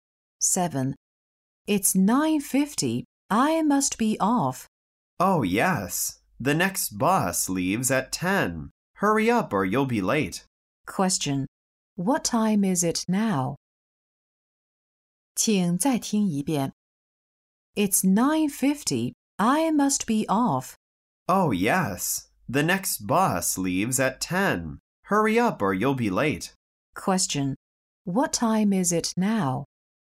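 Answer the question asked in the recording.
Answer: 9:50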